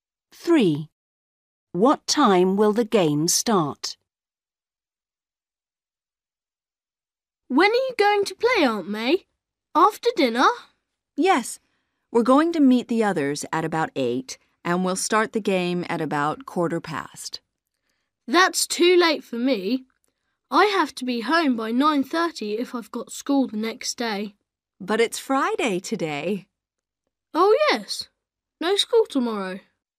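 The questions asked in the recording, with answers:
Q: What time will the game start?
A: At about 8:15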